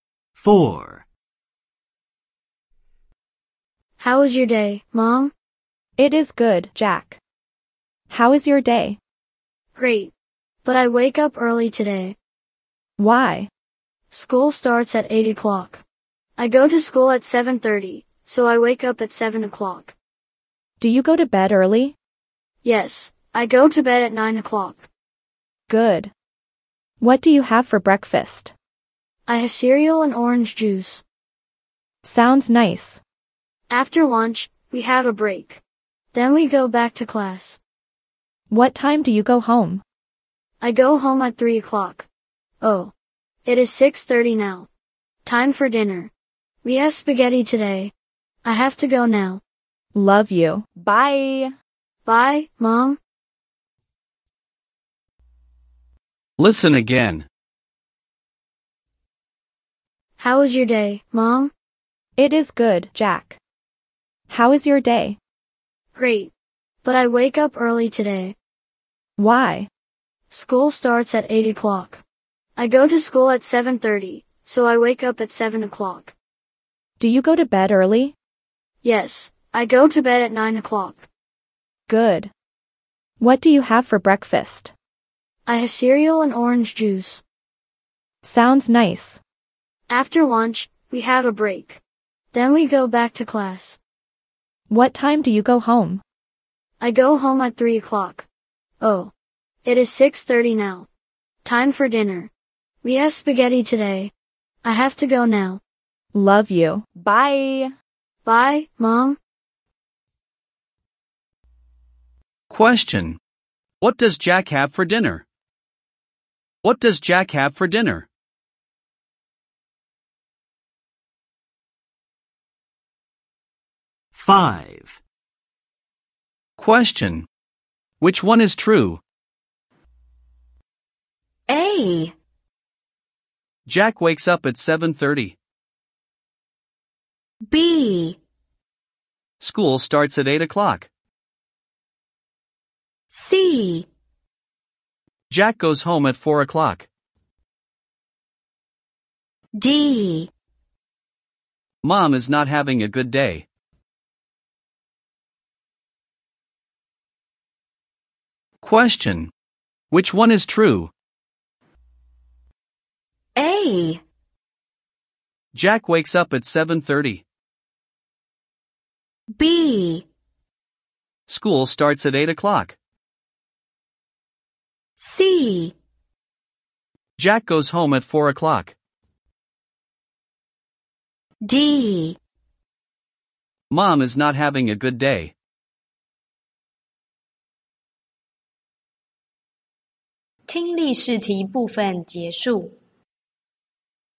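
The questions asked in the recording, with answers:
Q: What does Jack have for dinner?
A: Spaghetti

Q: Which one is true?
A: B: School starts at 8 o'clock.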